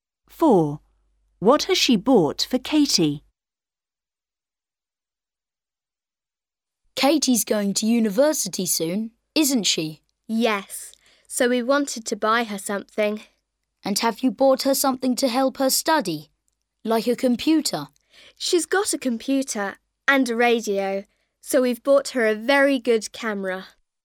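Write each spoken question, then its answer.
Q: What has she bought for Katie?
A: a camera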